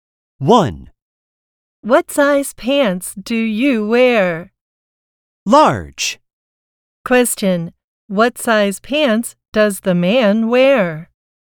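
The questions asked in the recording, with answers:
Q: What size pants does the man wear?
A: Large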